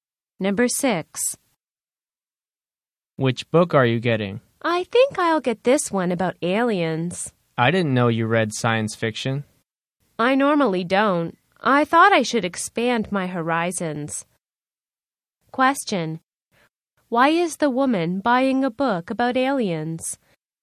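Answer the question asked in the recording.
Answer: To expand her horizons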